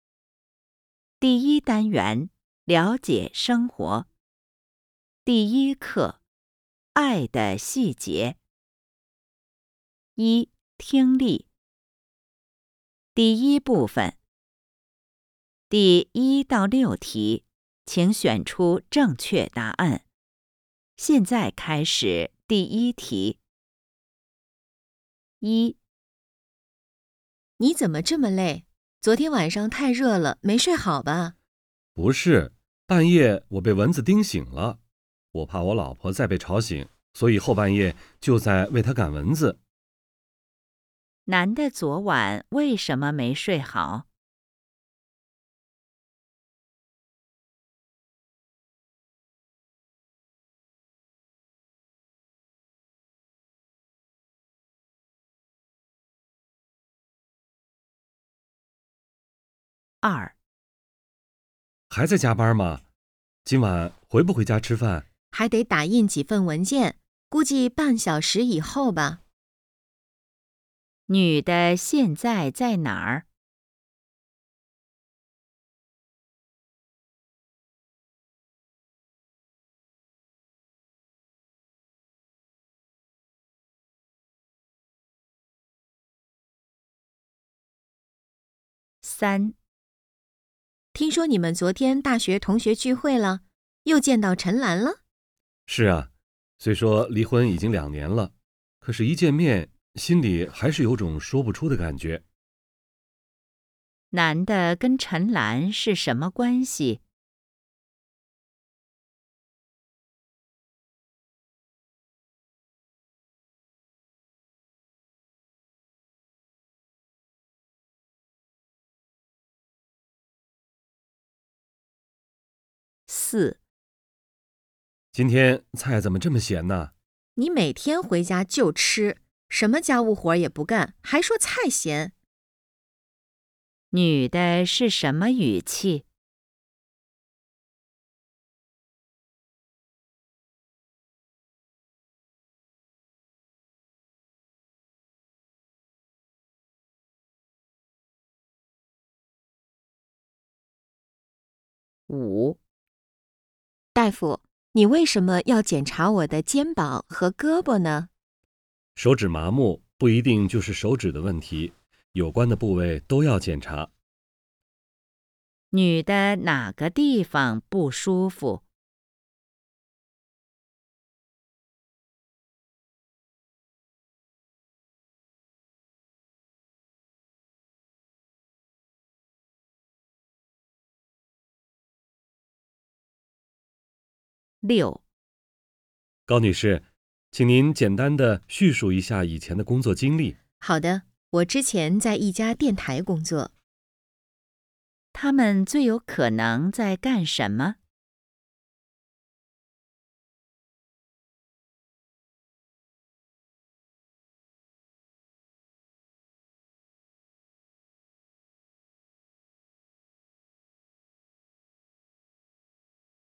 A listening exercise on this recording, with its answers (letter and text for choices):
第1-6题:请选择正确答案。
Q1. 男的昨晚为什么没睡好?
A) 太累了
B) 太热了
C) 和老婆吵架了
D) 为老婆赶蚊子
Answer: D) 为老婆赶蚊子

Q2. 女的现在在哪儿?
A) 家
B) 公司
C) 餐厅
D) 钟表店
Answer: B) 公司

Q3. 男的跟陈兰是什么关系?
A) 以前同事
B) 中学同学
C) 现在是夫妻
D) 以前是夫妻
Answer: D) 以前是夫妻

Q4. 女的是什么语气?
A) 感谢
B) 担心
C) 抱怨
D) 后悔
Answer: C) 抱怨

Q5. 女的哪个地方不舒服?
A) 手指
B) 肩膀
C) 胳膊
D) 脑袋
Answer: A) 手指

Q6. 他们最有可能在干什么?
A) 聚会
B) 面试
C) 聊天儿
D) 谈生意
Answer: B) 面试

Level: HSK 5